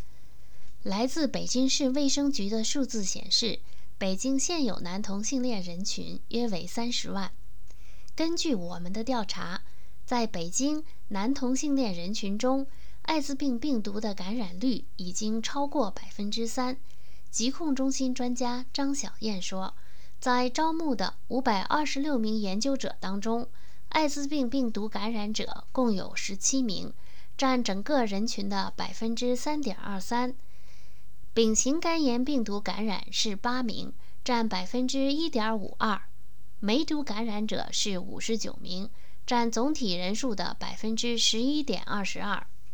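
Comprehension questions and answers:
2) 北京男同性恋人群艾滋病的感染率是多少?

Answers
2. 超过3%(3.23%)

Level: 3rd Year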